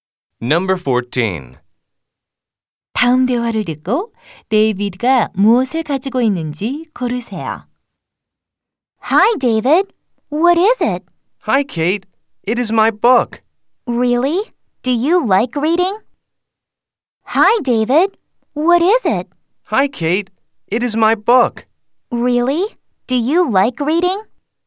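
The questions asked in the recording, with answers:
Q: 다음 대화를 듣고 데이비드가 무엇을 가지고 있는지 고르세요.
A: 책 (book)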